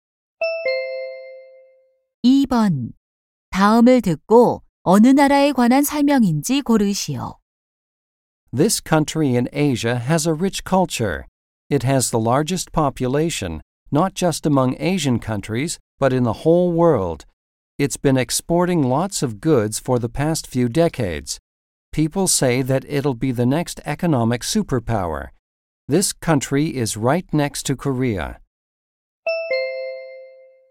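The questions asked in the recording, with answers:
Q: 다음을 듣고 어느 나라에 관한 설명인지 고르시오.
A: 중국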